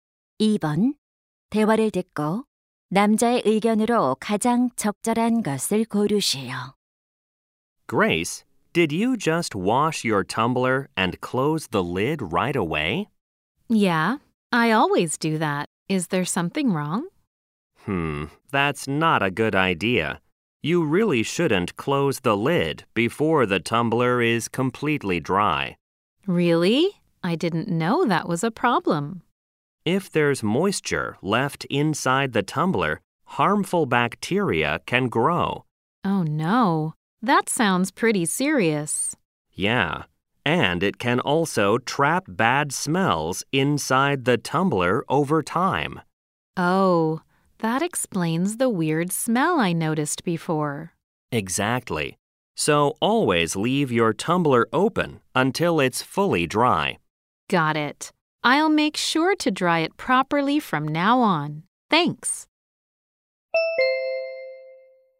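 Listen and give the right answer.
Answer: 텀블러는 완전히 건조한 후 뚜껑을 닫아야 한다.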